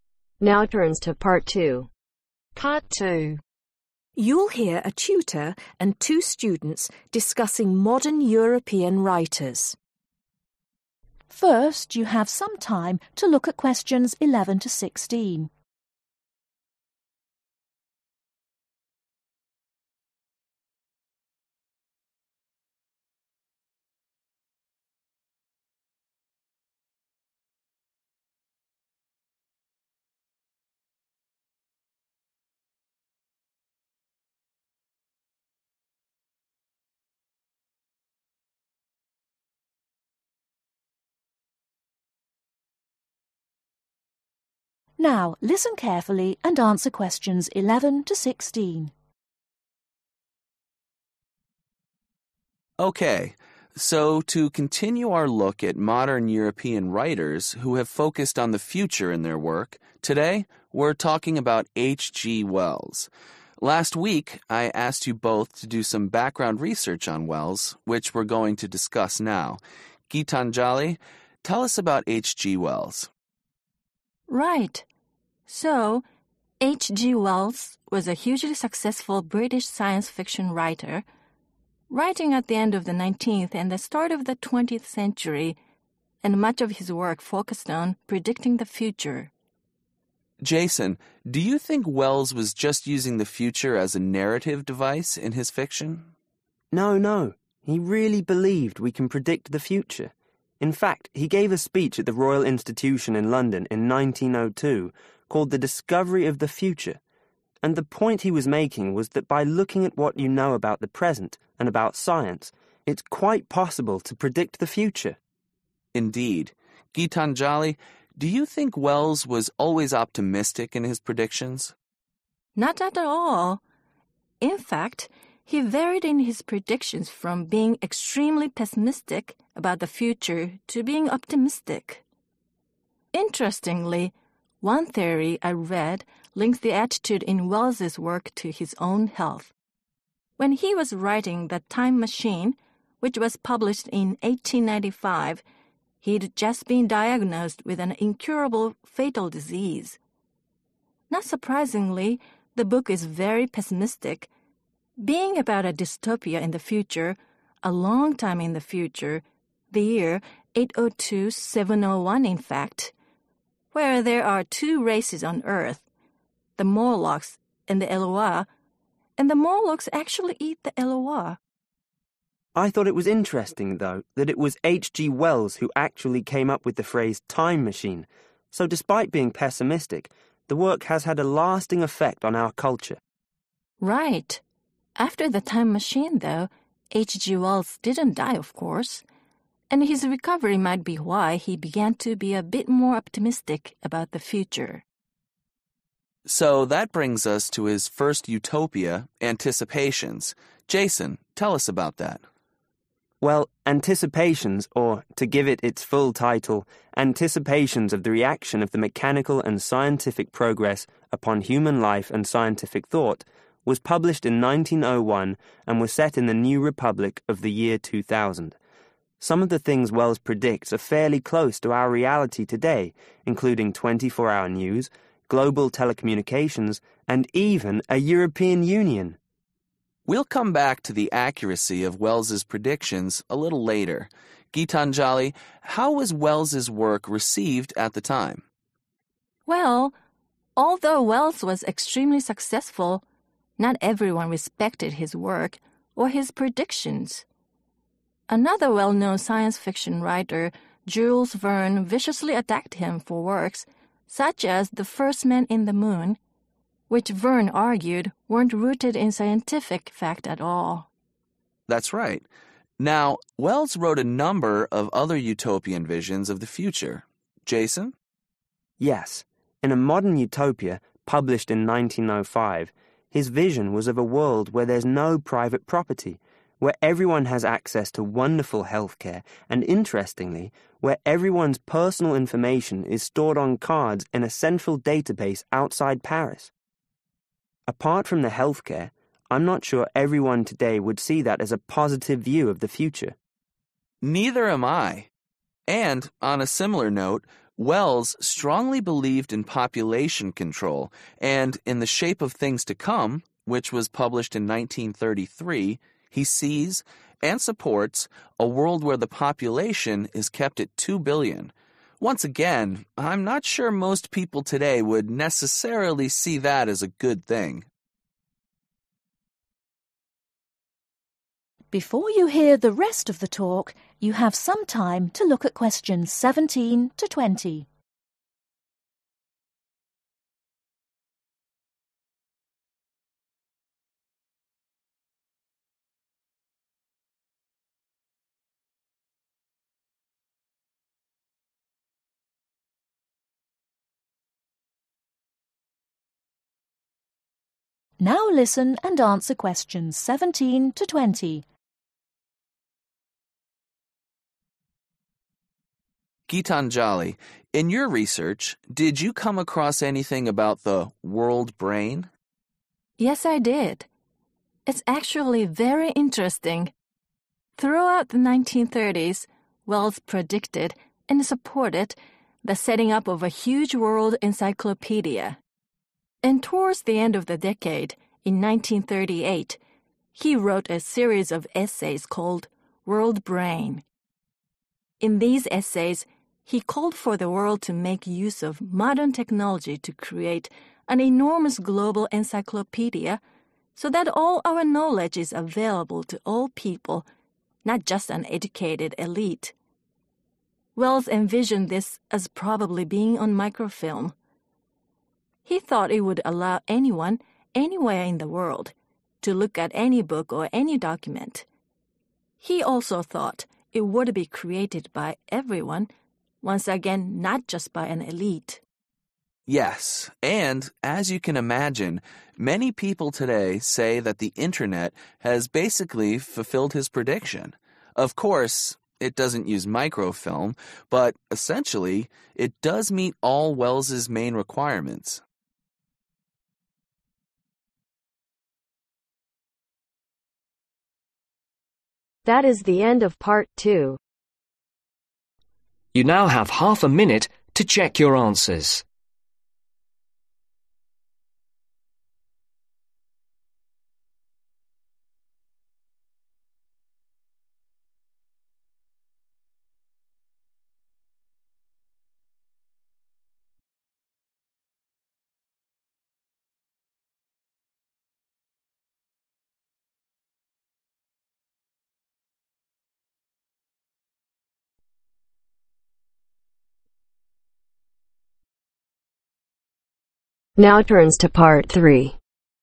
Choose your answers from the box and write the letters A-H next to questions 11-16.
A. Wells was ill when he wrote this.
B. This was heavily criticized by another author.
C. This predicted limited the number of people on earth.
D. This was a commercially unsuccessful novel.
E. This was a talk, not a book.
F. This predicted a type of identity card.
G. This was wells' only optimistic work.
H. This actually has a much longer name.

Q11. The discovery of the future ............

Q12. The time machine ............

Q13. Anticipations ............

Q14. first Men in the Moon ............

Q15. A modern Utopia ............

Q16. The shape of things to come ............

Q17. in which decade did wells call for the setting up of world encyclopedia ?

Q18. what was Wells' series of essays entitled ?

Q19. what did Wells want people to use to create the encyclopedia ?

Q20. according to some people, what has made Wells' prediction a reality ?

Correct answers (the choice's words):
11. This was a talk, not a book.
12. Wells was ill when he wrote this.
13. This actually has a much longer name.
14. This was heavily criticized by another author.
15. This predicted a type of identity card.
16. This predicted limited the number of people on earth.
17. (the) 1930s/1930
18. World brain
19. Modern technology
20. The internet/internet